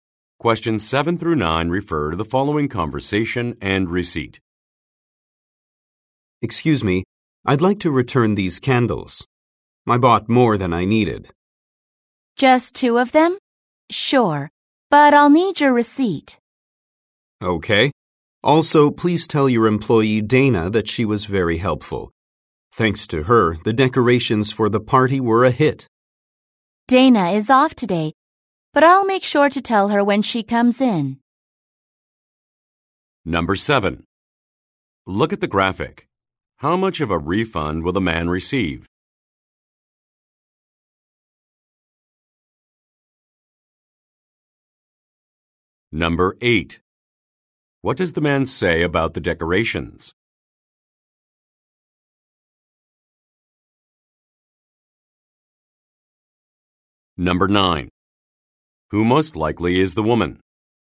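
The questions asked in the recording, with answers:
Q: What does the man say about the decorations?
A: They were a hit at the party.

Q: Who most likely is the woman?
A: A store employee.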